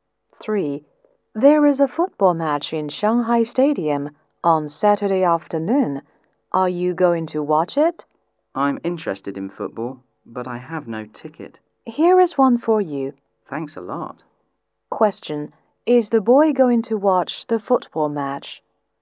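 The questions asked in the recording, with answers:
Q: Is the boy going to watch the football match?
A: Yes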